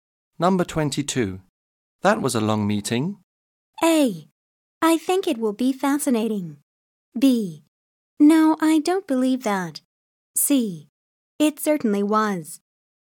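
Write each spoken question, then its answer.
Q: That was a long meeting.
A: C: It certainly was.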